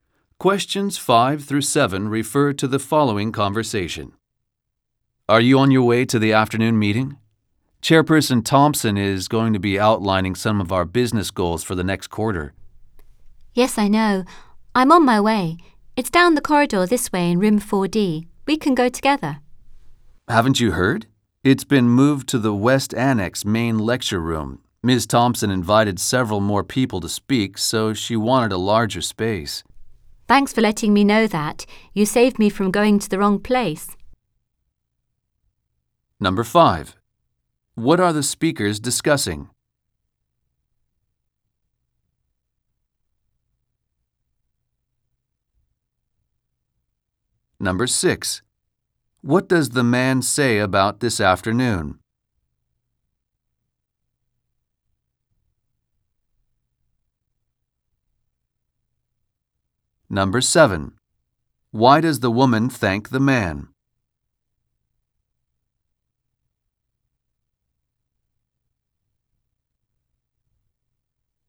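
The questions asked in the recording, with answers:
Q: What are the speakers discussing?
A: An afternoon meeting and where it is being held

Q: Why does the woman thank the man?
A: He told her the meeting had moved, so she didn't go to the wrong place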